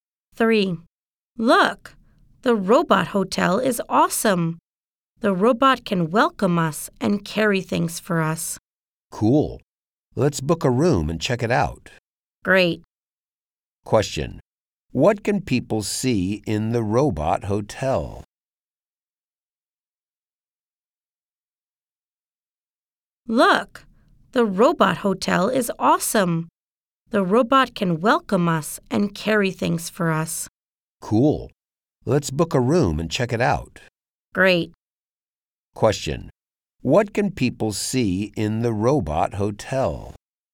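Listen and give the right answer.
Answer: Robots that welcome people and carry things.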